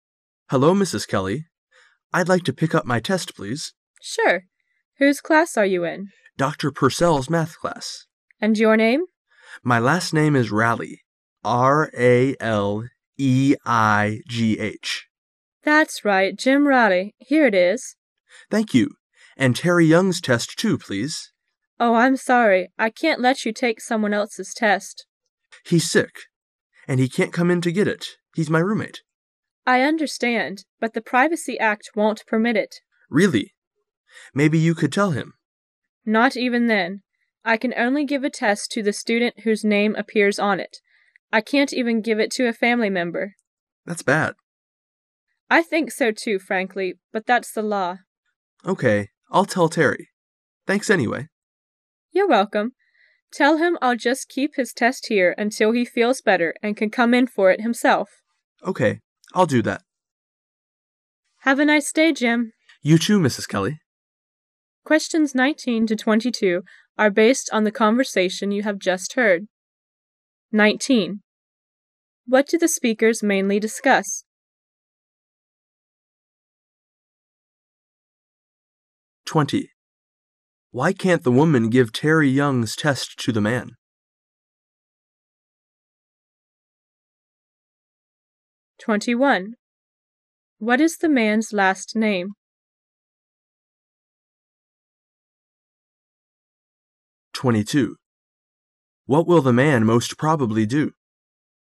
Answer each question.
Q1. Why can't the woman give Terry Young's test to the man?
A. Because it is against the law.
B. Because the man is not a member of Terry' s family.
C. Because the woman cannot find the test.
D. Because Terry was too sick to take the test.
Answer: A. Because it is against the law.

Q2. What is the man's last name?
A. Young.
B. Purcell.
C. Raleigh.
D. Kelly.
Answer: C. Raleigh.

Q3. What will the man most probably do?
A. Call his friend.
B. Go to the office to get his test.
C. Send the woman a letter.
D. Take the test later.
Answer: A. Call his friend.

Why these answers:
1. [解题思路] 本题考查的是细节。 [详细解答] 先看题目,再有针对性的认真听。依据"but the privacy act won't permit it" "but that's the law" 可以做出选择。
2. [解题思路] 本题是细节题。 [详细解答] 答案C。先看题目,再有针对性的认真听。依据"my last name is Raleigh.R—A—L—E—I—G—H"可以做出判断。
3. [解题思路] 本题是推理题。需要先把握大意。然后做出推理。 [详细解答] —般来讲,此类题目,几个选项都具有很强的迷惑性,一定要正确理解。关键词可以给出提示。由于" but the privacy act won't permit it" "but that's the law ",他只好说" I'll tell Terry",由此可以看出 A为正确答案。

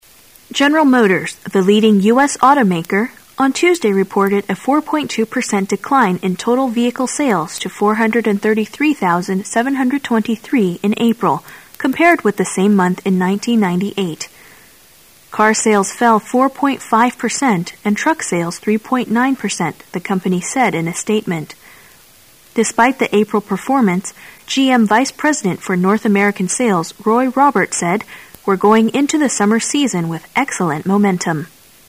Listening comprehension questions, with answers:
Questions 23 and 24 are based on the following news. At the end of the news item, you will be given 10 seconds to answer the questions. Now listen to the news.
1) What is the percentage of total decline in vehicle sales in April this year?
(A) 4.2.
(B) 4.5.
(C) 3.9.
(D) 4.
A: (A) 4.2.

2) What's the attitude of GM vice-president towards the prospects in summer?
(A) Doubtful.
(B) Pessimistic.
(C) Indifferent.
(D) Optimistic.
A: (D) Optimistic.

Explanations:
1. 本题测试关于具体数字的细节内容的理解能力。可从新闻的首句直接找到答案A。

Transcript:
A
[解析] 23-24 General Motors, the leading U.S. automaker on Tuesday reported a 4.2 per cent decline in total vehicle sales to 433,723 in April compared with the same month in 1998. Car sales fell 4.5 per cent and truck sales 3.9 per cent, the company said in a statement. Despite the April performance' GM vice-president for North American sales Roy Robert said: "We're going into the summer season with excellent momentum."

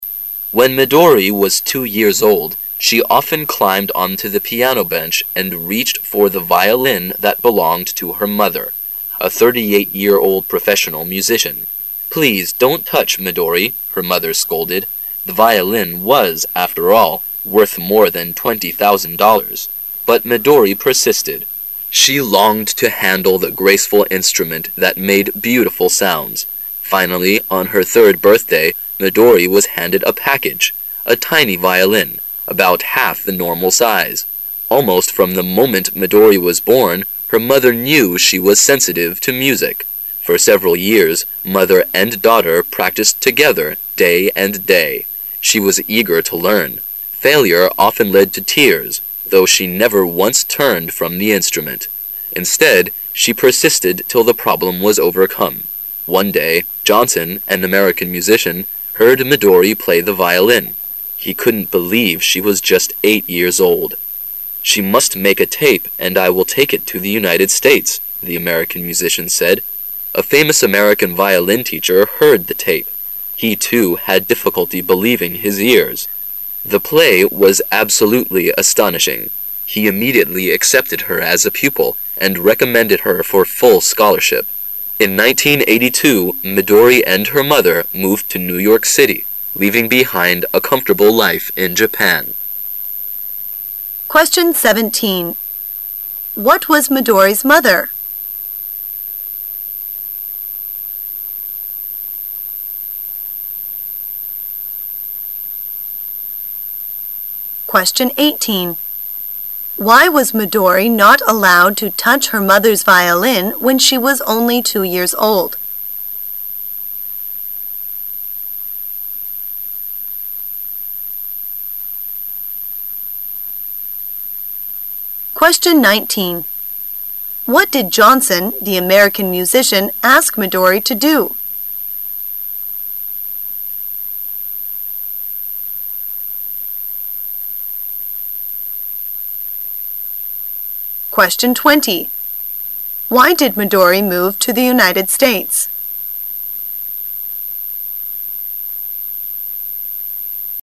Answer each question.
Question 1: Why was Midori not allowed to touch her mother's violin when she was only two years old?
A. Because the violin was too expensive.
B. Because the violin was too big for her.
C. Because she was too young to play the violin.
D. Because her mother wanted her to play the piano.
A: A. Because the violin was too expensive.

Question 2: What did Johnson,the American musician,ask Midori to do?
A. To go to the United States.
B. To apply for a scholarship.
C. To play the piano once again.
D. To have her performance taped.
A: D. To have her performance taped.

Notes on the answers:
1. 细节题。题干问为什么Midori两岁时was not allowed to touch她妈妈的小提琴。回忆原文相关细节:...The violin was...worth more than 20,000 dollars。

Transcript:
[解析] 17-20 When Midori was two years old, she often climbed onto the piano bench and reached for the violin that belonged to her mother, a 38-year-old professional musician. "Please don't touch, Midori," her mother scolded. The violin was, after all, worth more than 20, 000 dollars. But Midori persisted. She longed to handle the graceful instrument that made beautiful sounds. Finally, on her third birthday, Midori was handed a package, a tiny violin, about half the normal size. Almost from the moment Midori was born, her mother knew she was sensitive to music. For several years mother and daughter practised together day and day. She was eager to learn. Failure often led to tears, though, she never once turned from the instrument. Instead, she persisted till the problem was overcome. One day, Johnson, an American musician, heard Midori play the violin. He couldn't believe she was just eight years old. "She must make a tape and I will take it to the United States, "the American musician said. A famous American violin teacher heard the tape. He, too, had difficulty believing his ears. The play was absolutely astonishing. He immediately accepted her as a pupil and recommended her for full scholarship. In 1982, Midori and her mother moved to New York City, leaving behind a comfortable life in Japan. What was Midori's mother?

